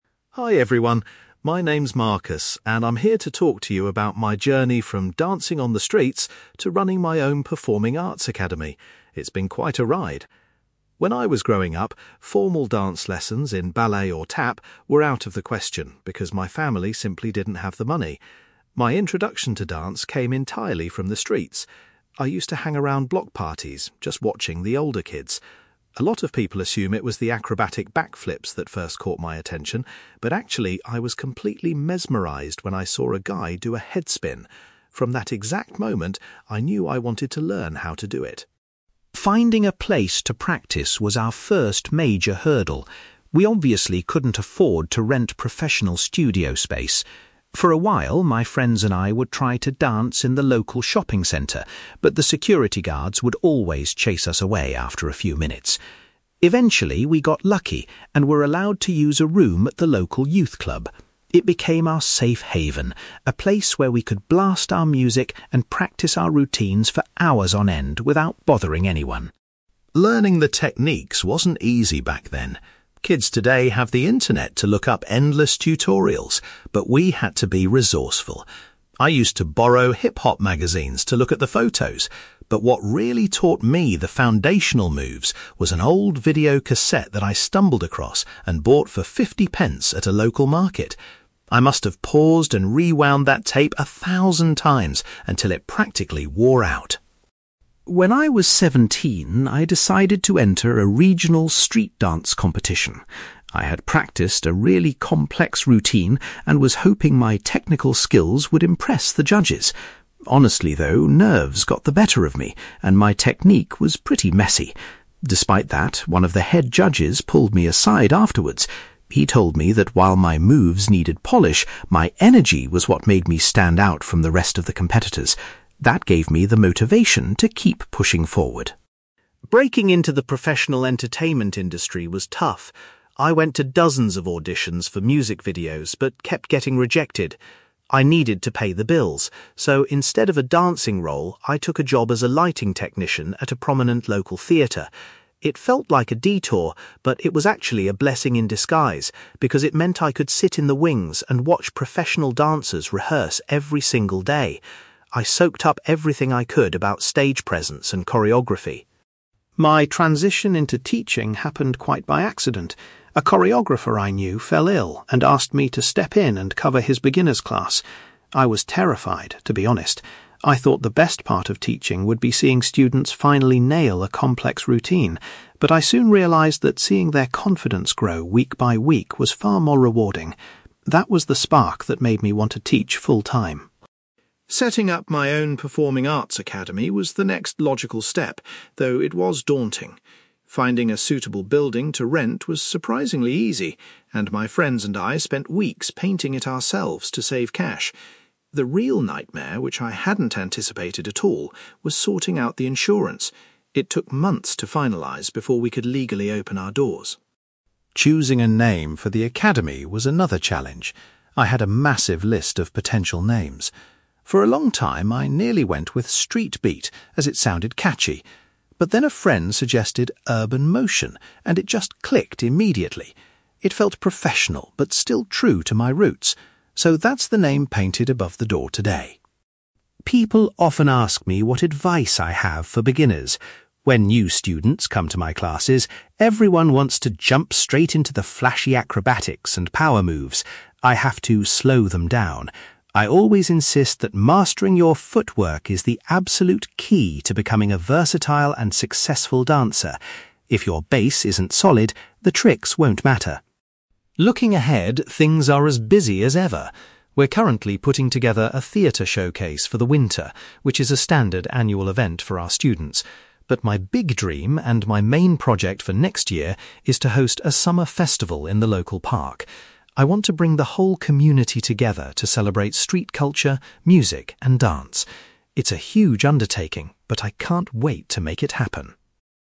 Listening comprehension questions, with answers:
You will hear a man called Marcus giving a presentation about his career as a street-dance instructor. For questions 9-18, complete the sentences with a word or short phrase.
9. Marcus was originally inspired to start street dancing after seeing someone perform a (9)........................... .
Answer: headspin

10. Marcus and his friends eventually used a (10)........................... as a safe place to practice their routines.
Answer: youth club

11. Marcus says he learned his basic moves by watching a (11)........................... he bought cheaply.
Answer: video cassette

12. In his first competition, a judge told Marcus that his (12)........................... was his best quality.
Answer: energy

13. Marcus's first job in the entertainment industry was working as a (13)........................... .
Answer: lighting technician

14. Marcus found that helping his students develop their (14)........................... was the most satisfying part of teaching.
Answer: confidence

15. When opening his academy, Marcus found that arranging the (15)........................... was the most difficult task.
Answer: insurance

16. Marcus chose to give his new academy the name (16)........................... .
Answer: Urban Motion

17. Marcus advises beginners to concentrate on improving their (17)........................... before trying advanced moves.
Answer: footwork

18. Marcus is planning to organise a (18)........................... for the local community next year.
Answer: summer festival

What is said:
Marcus: Hi everyone, my name is Marcus, and I'm here to talk to you about my journey from dancing on the streets to running my own performing arts academy. It's been quite a ride. When I was growing up, formal dance lessons in ballet or tap were out of the question because my family simply didn't have the money. My introduction to dance came entirely from the streets. I used to hang around block parties, just watching the older kids. A lot of people assume it was the acrobatic backflips that first caught my attention, but actually, I was completely mesmerised when I saw a guy do a headspin. From that exact moment, I knew I wanted to learn how to do it.
Finding a place to practice was our first major hurdle. We obviously couldn't afford to rent professional studio space. For a while, my friends and I would try to dance in the local shopping centre, but the security guards would always chase us away after a few minutes. Eventually, we got lucky and were allowed to use a room at the local youth club. It became our safe haven, a place where we could blast our music and practice our routines for hours on end without bothering anyone.
Learning the techniques wasn't easy back then. Kids today have the internet to look up endless tutorials, but we had to be resourceful. I used to borrow hip-hop magazines to look at the photos, but what really taught me the foundational moves was an old video cassette that I stumbled across and bought for fifty pence at a local market. I must have paused and rewound that tape a thousand times until it practically wore out!
When I was seventeen, I decided to enter a regional street-dance competition. I had practiced a really complex routine and was hoping my technical skills would impress the judges. Honestly, though, nerves got the better of me and my technique was pretty messy. Despite that, one of the head judges pulled me aside afterwards. He told me that while my moves needed polish, my energy was what made me stand out from the rest of the competitors. That gave me the motivation to keep pushing forward.
Breaking into the professional entertainment industry was tough. I went to dozens of auditions for music videos, but kept getting rejected. I needed to pay the bills, so instead of a dancing role, I took a job as a lighting technician at a prominent local theatre. It felt like a detour, but it was actually a blessing in disguise because it meant I could sit in the wings and watch professional dancers rehearse every single day. I soaked up everything I could about stage presence and choreography.
My transition into teaching happened quite by accident. A choreographer I knew fell ill and asked me to step in and cover his beginner's class. I was terrified, to be honest. I thought the best part of teaching would be seeing students finally nail a complex routine, but I soon realised that seeing their confidence grow week by week was far more rewarding. That was the spark that made me want to teach full-time.
Setting up my own performing arts academy was the next logical step, though it was daunting. Finding a suitable building to rent was surprisingly easy, and my friends and I spent weeks painting it ourselves to save cash. The real nightmare, which I hadn't anticipated at all, was sorting out the insurance. It took months to finalise before we could legally open our doors.
Choosing a name for the academy was another challenge. I had a massive list of potential names. For a long time, I nearly went with 'Street Beat', as it sounded catchy. But then a friend suggested Urban Motion, and it just clicked immediately. It felt professional but still true to my roots. So, that's the name painted above the door today.
People often ask me what advice I have for beginners. When new students come to my classes, everyone wants to jump straight into the flashy acrobatics and power moves. I have to slow them down. I always insist that mastering your footwork is the absolute key to becoming a versatile and successful dancer. If your base isn't solid, the tricks won't matter.
Looking ahead, things are as busy as ever. We're currently putting together a theatre showcase for the winter, which is a standard annual event for our students. But my big dream, and my main project for next year, is to host a summer festival in the local park. I want to bring the whole community together to celebrate street culture, music, and dance. It's a huge undertaking, but I can't wait to make it happen.

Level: B2